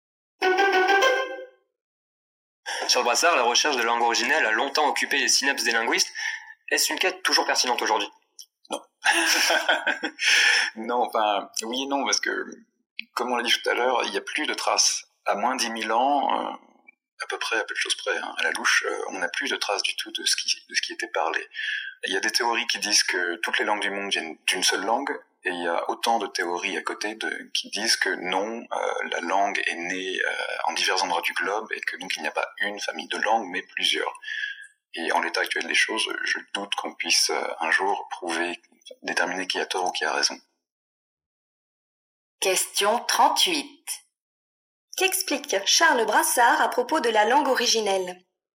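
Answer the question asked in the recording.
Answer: On ne pourra sans doute jamais prouver s'il y a eu une seule langue d'origine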